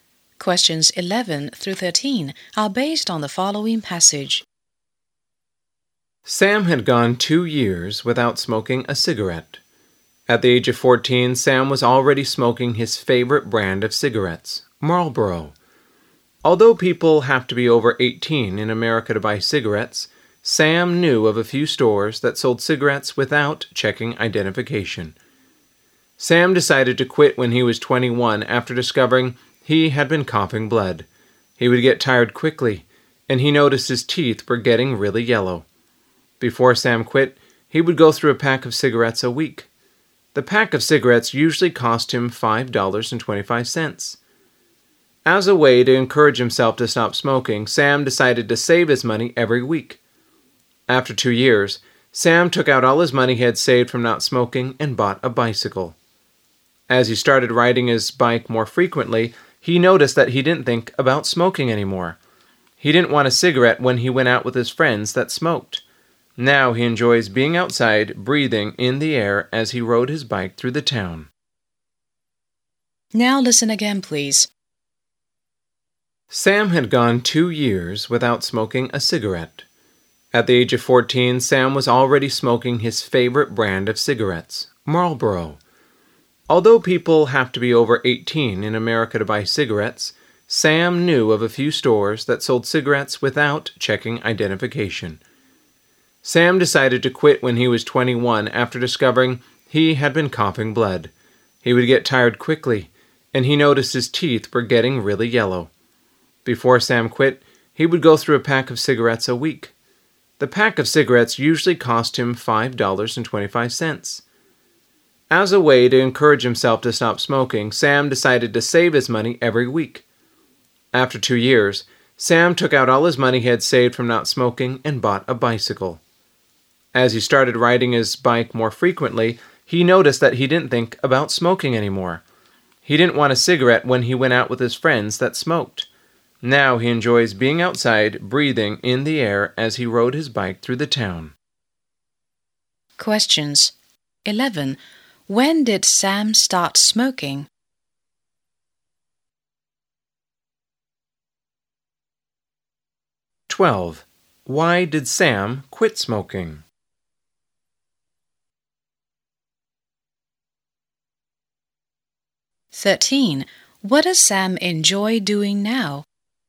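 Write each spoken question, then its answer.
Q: When did Sam start smoking?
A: At the age of 14 or earlier

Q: Why did Sam quit smoking?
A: He was coughing blood, got tired quickly and his teeth were yellow

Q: What does Sam enjoy doing now?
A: Riding his bike outside through the town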